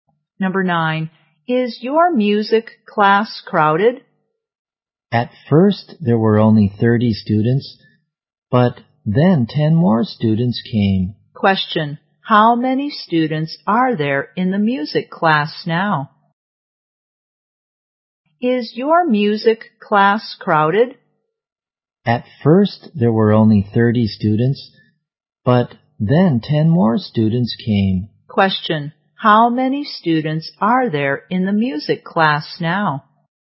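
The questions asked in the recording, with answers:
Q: Question, how many students are there in the music class now?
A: 40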